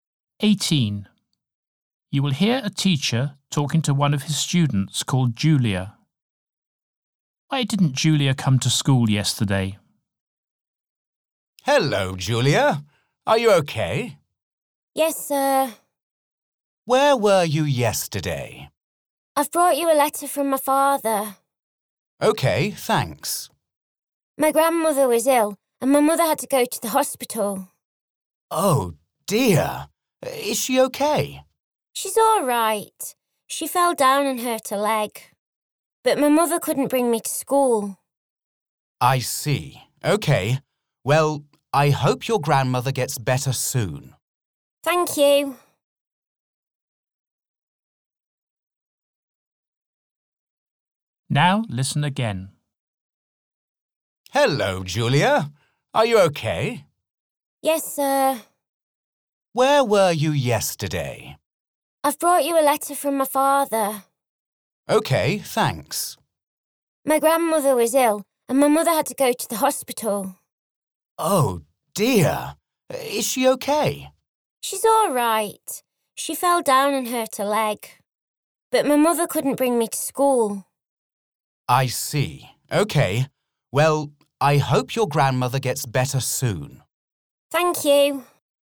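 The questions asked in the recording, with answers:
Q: Why didn't Julia come to school yesterday?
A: Her grandmother was ill, so her mother had to go to the hospital and couldn't bring her to school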